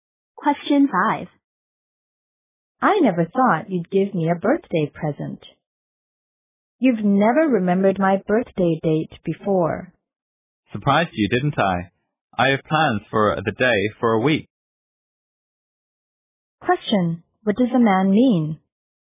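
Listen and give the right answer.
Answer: He had been planning the surprise for a week.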